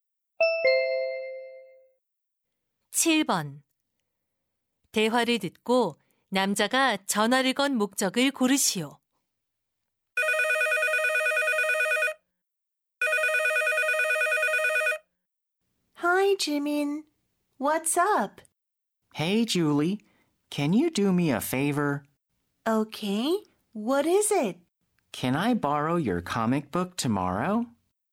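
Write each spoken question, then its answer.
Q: 대화를 듣고 남자가 전화를 건 목적을 고르시오.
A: 만화책을 빌리려고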